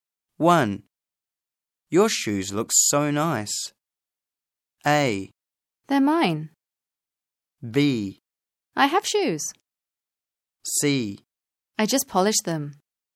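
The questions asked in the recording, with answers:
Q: Your shoes look so nice.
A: C: I just polished them.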